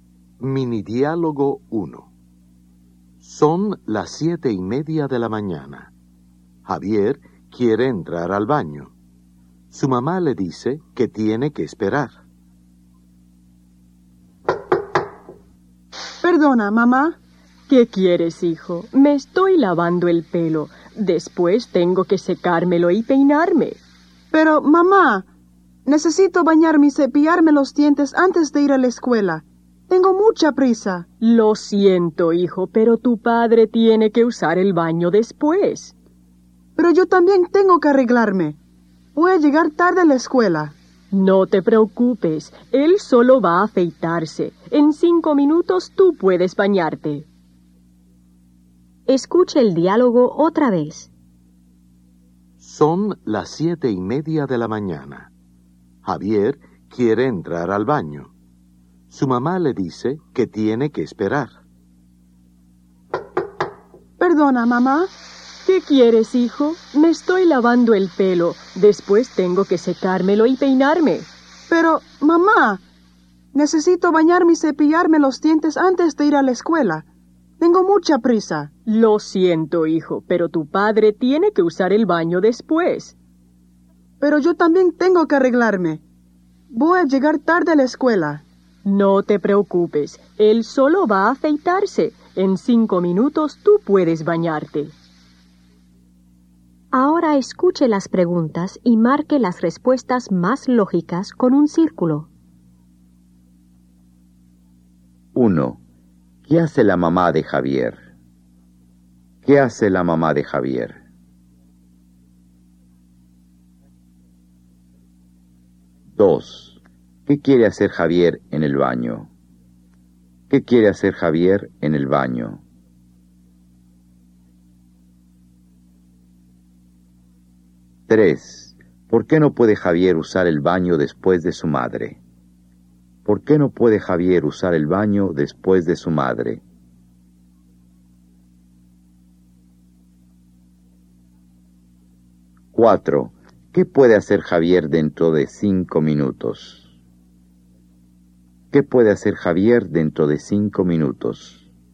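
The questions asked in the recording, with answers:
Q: ¿Qué hace la mamá de Javier?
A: Se está lavando el pelo.

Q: ¿Qué quiere hacer Javier en el baño?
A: Bañarse y cepillarse los dientes.

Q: ¿Por qué no puede Javier usar el baño después de su madre?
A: Porque su padre tiene que usar el baño después.

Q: ¿Qué puede hacer Javier dentro de 5 minutos?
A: Bañarse.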